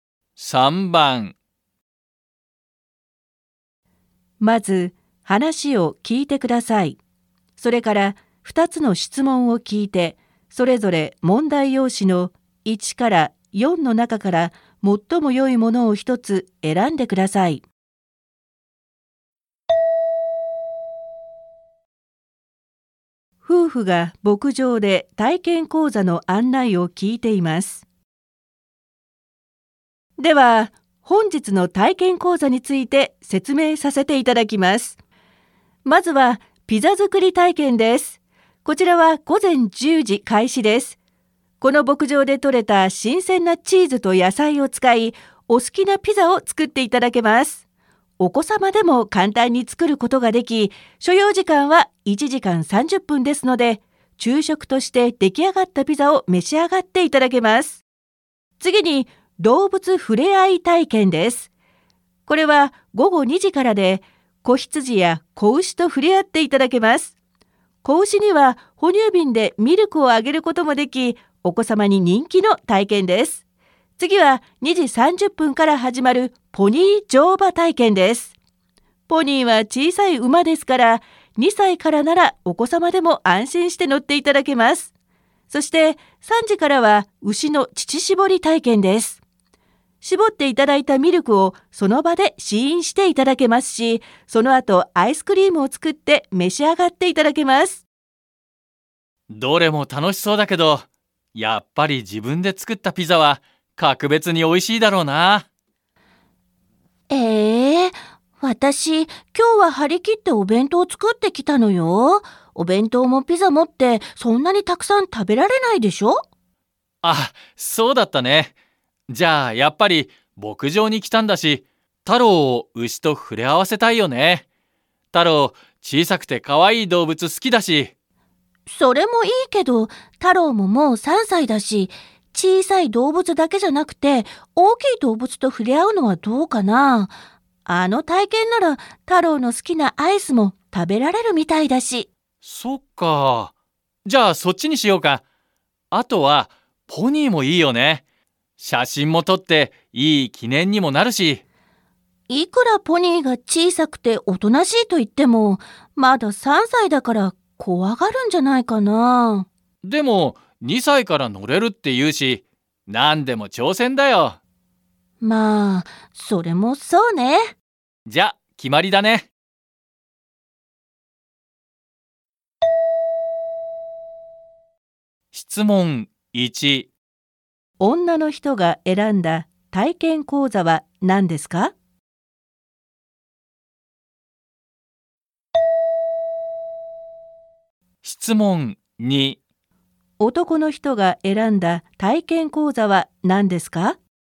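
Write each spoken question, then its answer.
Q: 女の人が選んだ体験講座は何ですか?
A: 牛の乳搾り体験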